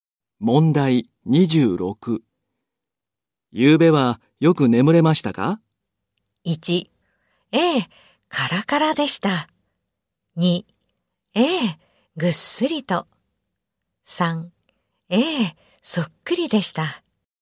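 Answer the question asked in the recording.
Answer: 2: ええ、ぐっすりと。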